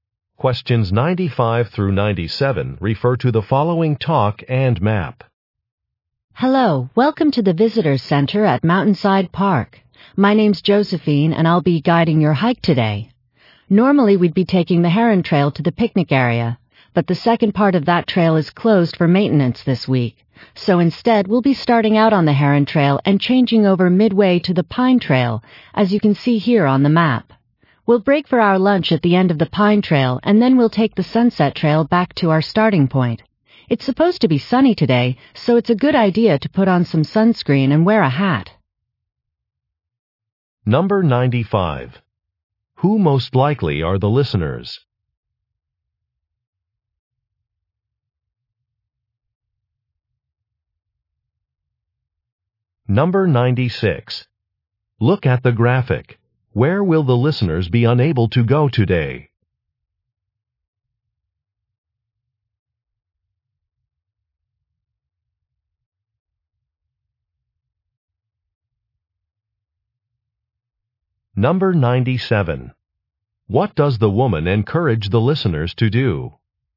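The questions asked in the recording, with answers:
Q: Who most likely are the listeners?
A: Hikers

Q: What does the woman encourage the listeners to do?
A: Wear sunscreen and a hat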